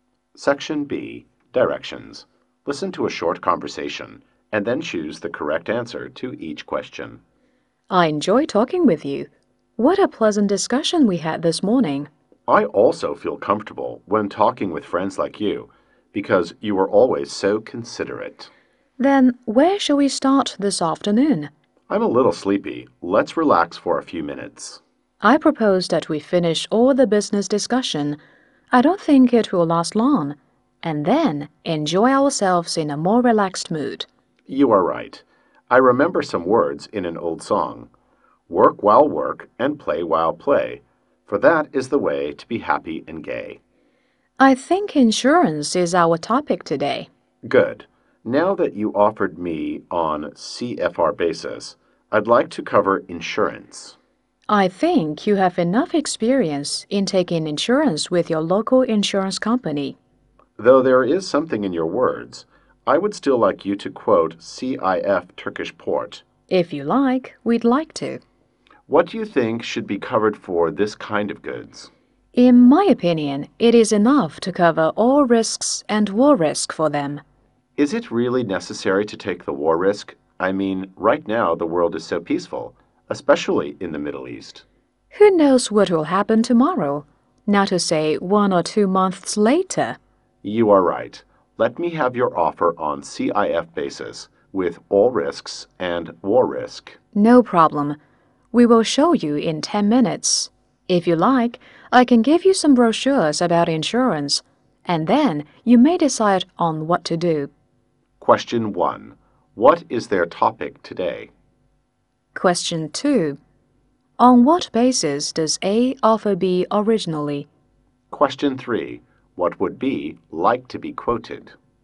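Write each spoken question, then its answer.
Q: What is their topic today?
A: Insurance

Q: On what basis does A offer B originally?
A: CFR

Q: What would B like to be quoted?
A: CIF Turkish port, with all risks and war risk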